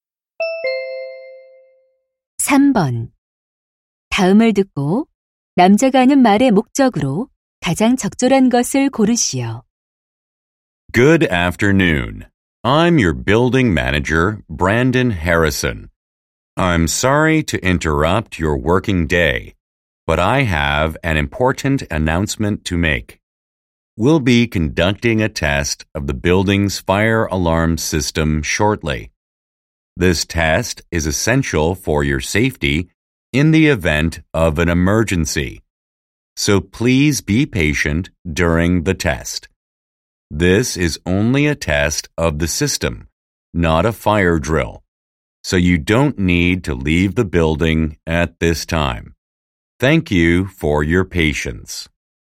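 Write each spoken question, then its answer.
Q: 다음을 듣고 남자가 하는 말의 목적으로 가장 적절한 것을 고르시오.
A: 건물 화재경보 시스템 점검을 안내하려고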